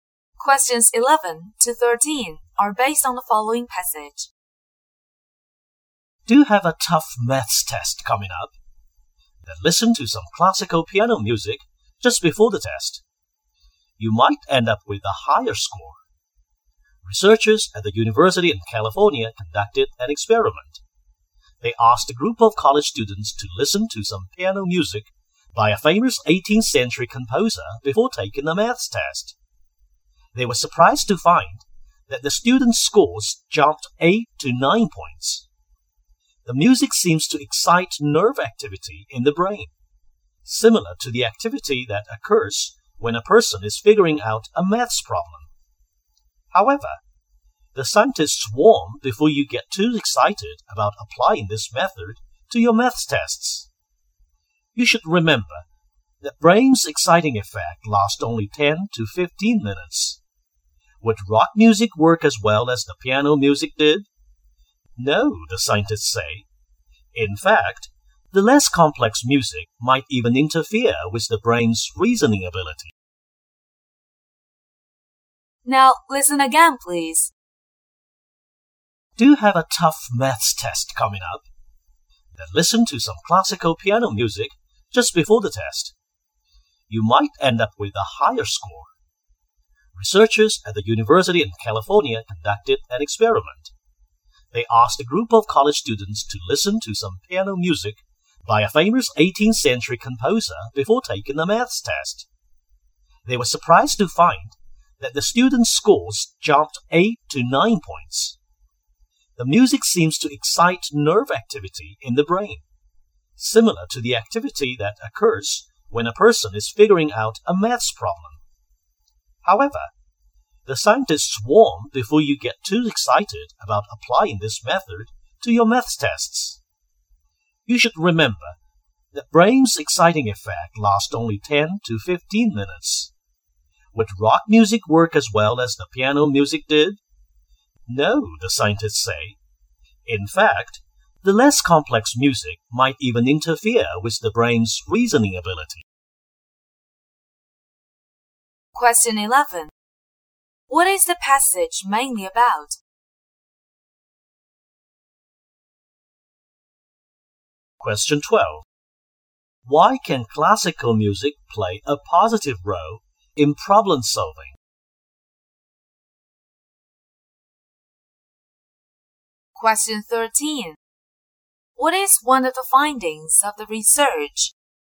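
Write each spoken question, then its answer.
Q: What is the passage mainly about?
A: Classical piano music can improve maths test scores

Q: Why can classical music play a positive role in problem solving?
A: It excites nerve activity in the brain similar to that used in solving maths problems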